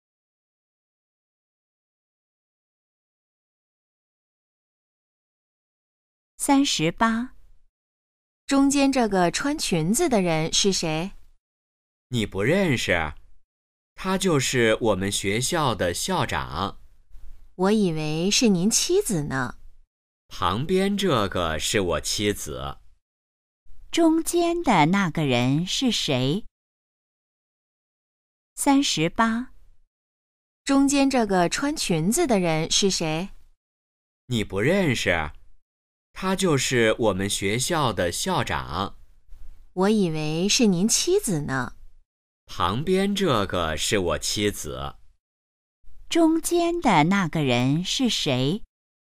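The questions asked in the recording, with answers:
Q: 中间的那个人是谁?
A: 学校的校长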